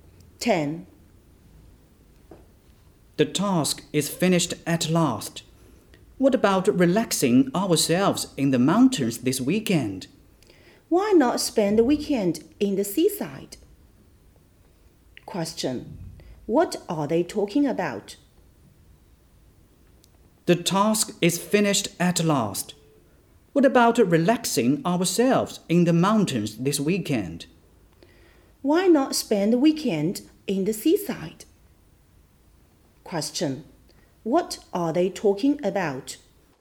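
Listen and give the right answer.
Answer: Where to spend the weekend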